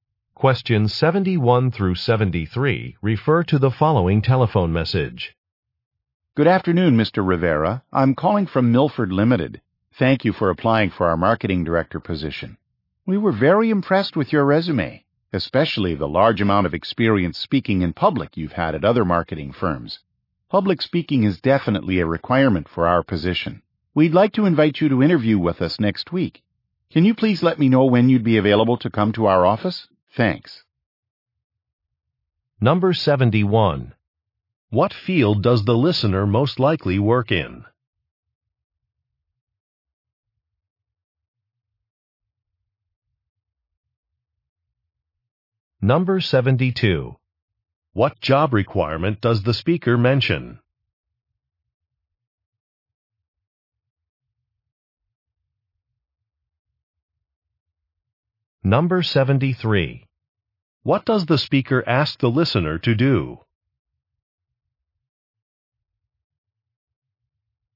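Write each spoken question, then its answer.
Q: What field does the listener most likely work in?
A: Marketing

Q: What job requirement does the speaker mention?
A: Public speaking

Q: What does the speaker ask the listener to do?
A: Say when he is available for an interview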